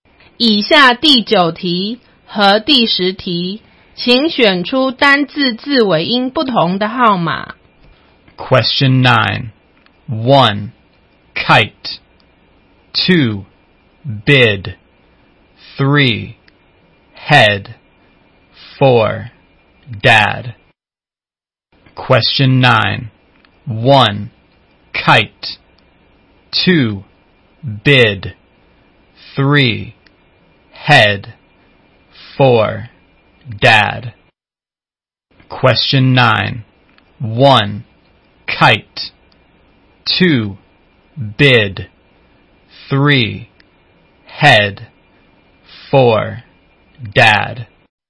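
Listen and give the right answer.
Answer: 1: kite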